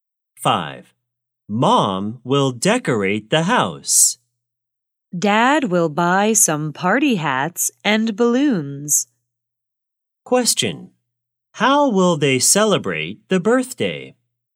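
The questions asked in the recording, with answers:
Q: How will they celebrate the birthday?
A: Decorate the house and buy party hats and balloons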